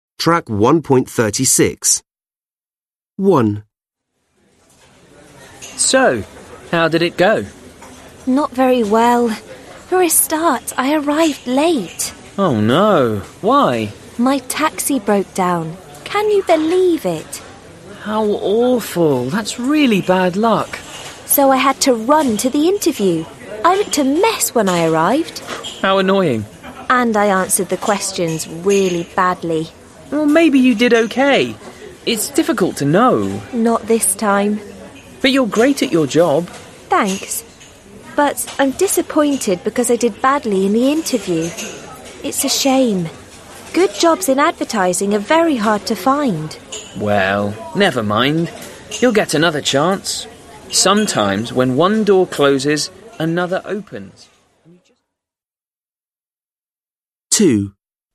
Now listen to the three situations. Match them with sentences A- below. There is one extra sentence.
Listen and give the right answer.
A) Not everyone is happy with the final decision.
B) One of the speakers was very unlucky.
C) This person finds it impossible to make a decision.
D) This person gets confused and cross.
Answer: B) One of the speakers was very unlucky.

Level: Lớp 10